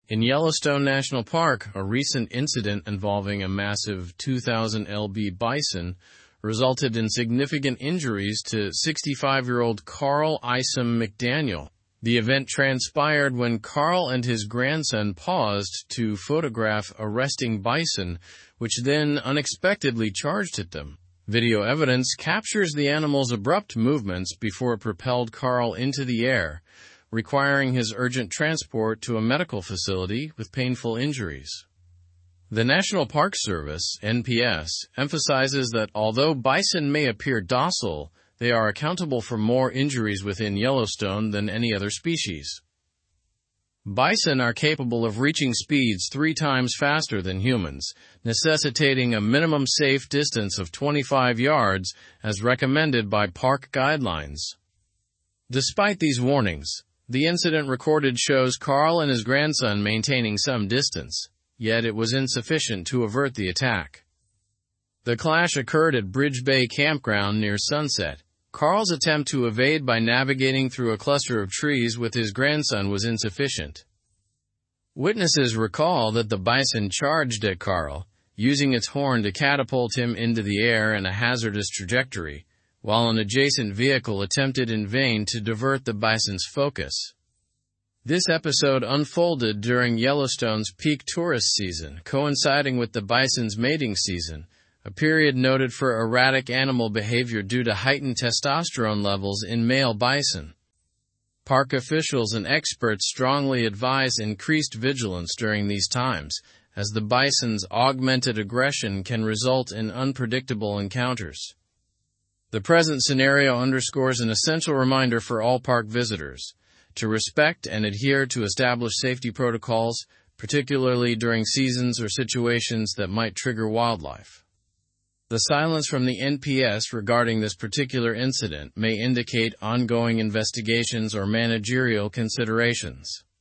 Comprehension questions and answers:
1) Who was injured in the incident and how did it happen?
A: Carl Isom-McDaniel was injured when a bison charged at him in Yellowstone National Park.

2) What does the National Park Service emphasize regarding bison?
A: The NPS emphasizes that bison are responsible for more injuries than any other species in Yellowstone.

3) How do bison's running capabilities compare to humans'?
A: Bison can run three times faster than humans.

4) Where did the incident take place?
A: The incident occurred at Bridge Bay Campground in Yellowstone National Park.

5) During what season did the incident occur and why is this significant?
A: The incident occurred during the bison's mating season, which is significant due to increased aggression.

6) How did witnesses describe Carl's attempt to evade the bison?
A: Witnesses described Carl's attempt to escape through trees as futile before the bison struck him.

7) What might the NPS's silence regarding the incident suggest?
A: The NPS's silence might suggest ongoing investigations or management considerations regarding the incident.

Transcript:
In Yellowstone National Park, a recent incident involving a massive 2,000lb bison resulted in significant injuries to 65-year-old Carl Isom-McDaniel. The event transpired when Carl and his grandson paused to photograph a resting bison, which then unexpectedly charged at them. Video evidence captures the animal's abrupt movements before it propelled Carl into the air, requiring his urgent transport to a medical facility with painful injuries.
The National Park Service (NPS) emphasizes that although bison may appear docile, they are accountable for more injuries within Yellowstone than any other species. Bison are capable of reaching speeds three times faster than humans, necessitating a minimum safe distance of 25 yards as recommended by park guidelines. Despite these warnings, the incident recorded shows Carl and his grandson maintaining some distance, yet it was insufficient to avert the attack.
The clash occurred at Bridge Bay Campground near sunset. Carl's attempt to evade by navigating through a cluster of trees with his grandson was insufficient. Witnesses recall that the bison charged at Carl, using its horn to catapult him into the air in a hazardous trajectory, while an adjacent vehicle attempted in vain to divert the bison's focus.
This episode unfolded during Yellowstone's peak tourist season, coinciding with the bison's mating season—a period noted for erratic animal behavior due to heightened testosterone levels in male bison. Park officials and experts strongly advise increased vigilance during these times, as the bison's augmented aggression can result in unpredictable encounters.
The present scenario underscores an essential reminder for all park visitors: to respect and adhere to established safety protocols, particularly during seasons or situations that might trigger wildlife. The silence from the NPS regarding this particular incident may indicate ongoing investigations or managerial considerations.

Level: Level 4